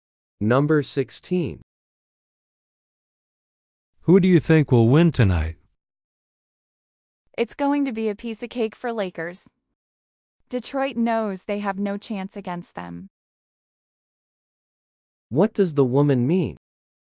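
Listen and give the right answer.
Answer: The Lakers will win easily.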